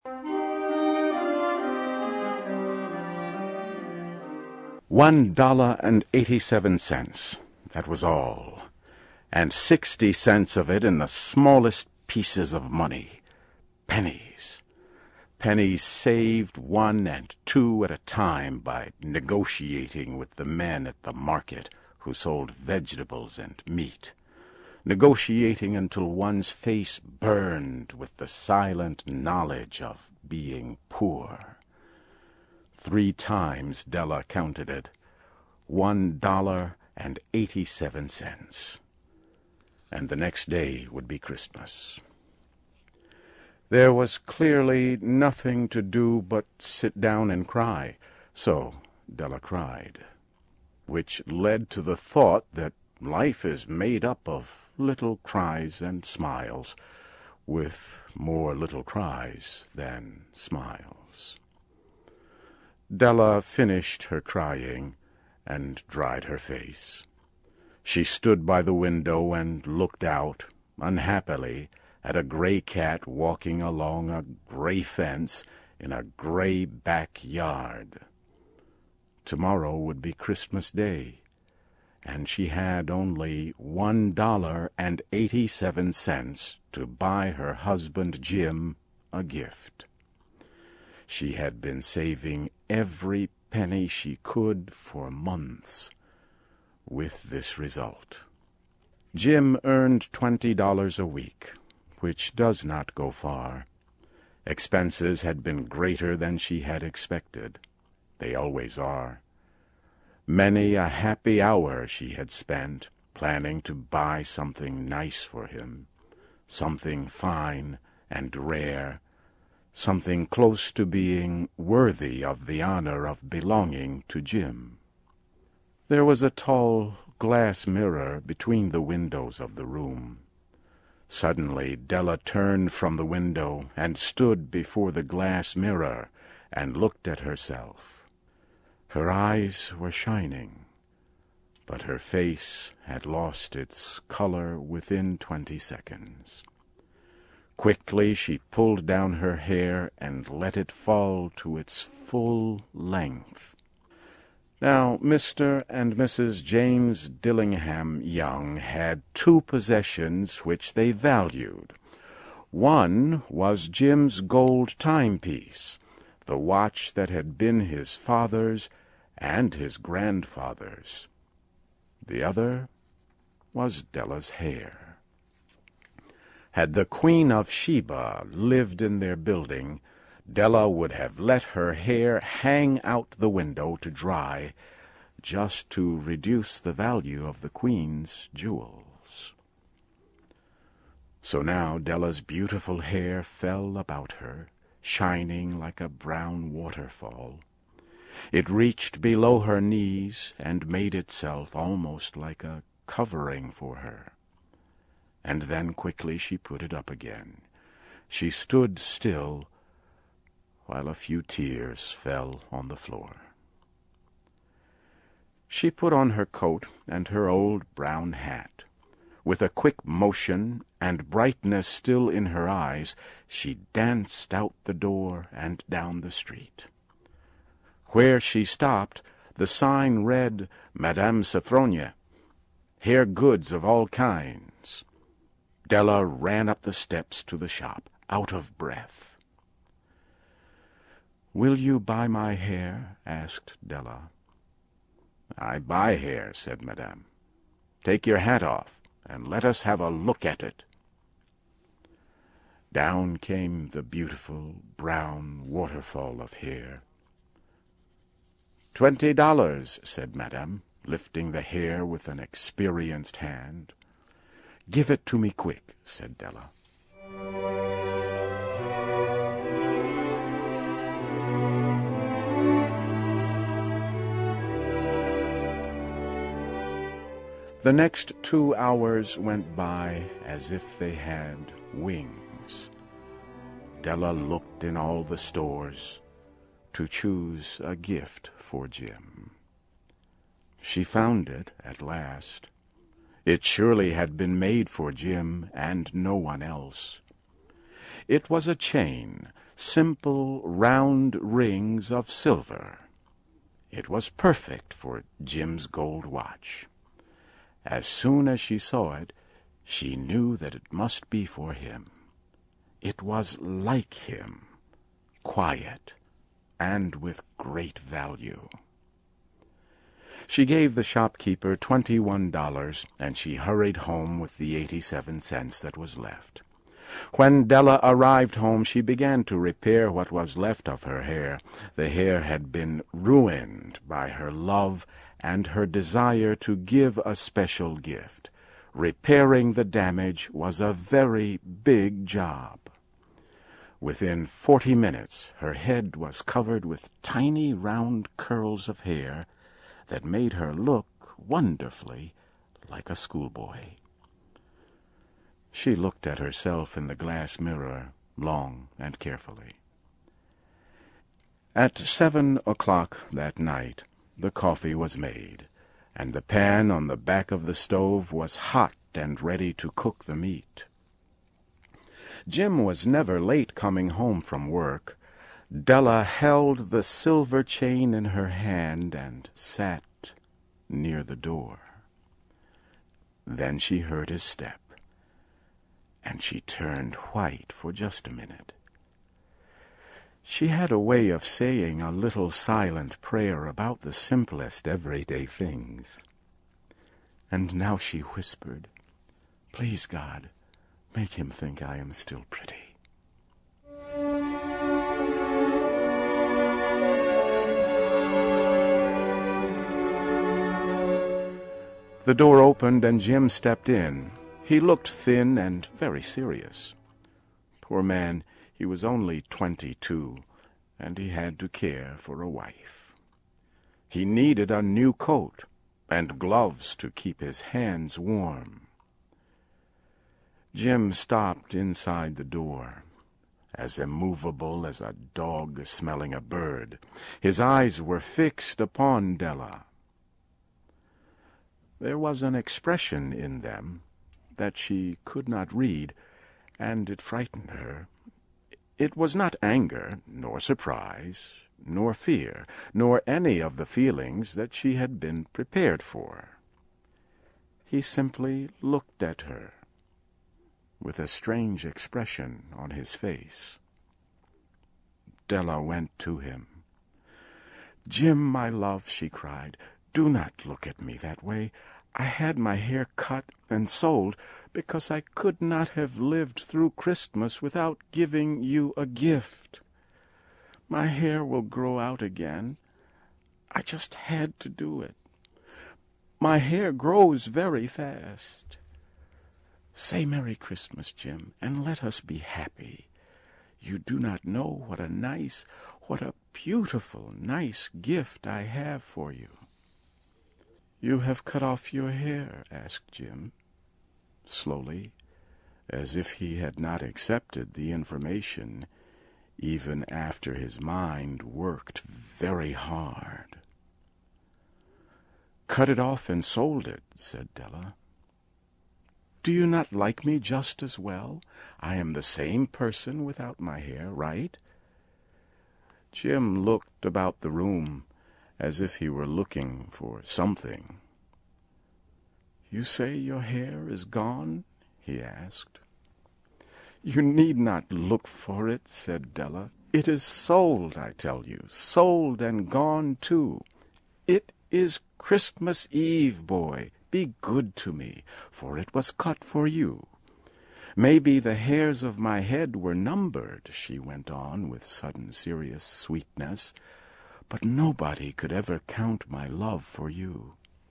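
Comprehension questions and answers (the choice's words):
Listen carefully and for questions 1-6, choose the answer (A, B, C or D) which you think best completes each question.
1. What does Della buy for Jim?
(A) A fine cigar.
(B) A better wedding ring.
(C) A chain for his pocket watch.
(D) A moleskin wallet.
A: A chain for his pocket watch.

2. How much did Della have initially to spend on Jim's gift?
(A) $21.87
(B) .60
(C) $20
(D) $1.87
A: $1.87

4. What does Madame Sofronie do for a living?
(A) She only buys hair combs.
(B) She only sells hair combs.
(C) She buys only hair.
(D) She buys hair goods of all kinds.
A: She buys hair goods of all kinds.

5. What does Della worry about her husband Jim?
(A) That he will no longer find her attractive.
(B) That he won't like her gift.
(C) That he did not purchase a gift for her.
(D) That he will be angry at her for spending too much.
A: That he will no longer find her attractive.

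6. What does Della sell to raise additional money?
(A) Her long hair.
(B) Her locket.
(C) Her mother's wedding ring.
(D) Their wedding china.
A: Her long hair.

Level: CAE - Certificate in Advanced English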